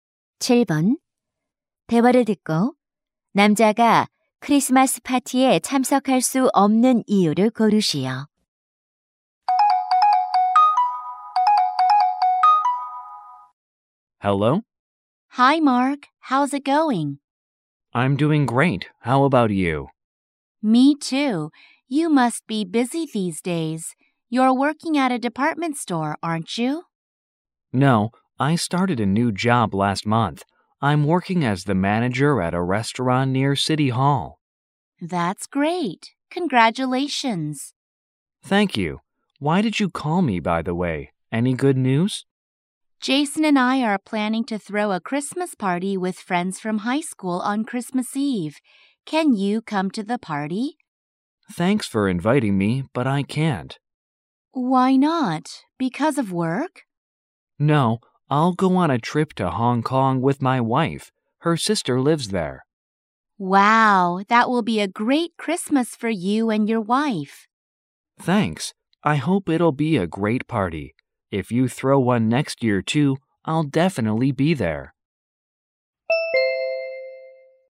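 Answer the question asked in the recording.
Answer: 아내와 홍콩으로 여행을 가서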